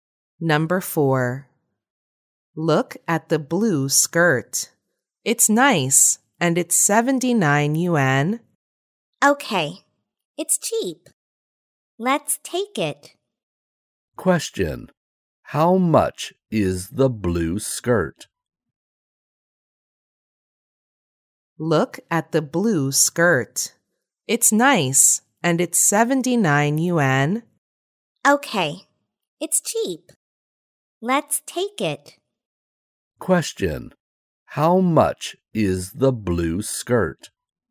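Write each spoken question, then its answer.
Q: Question. How much is the blue skirt?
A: 79 yuan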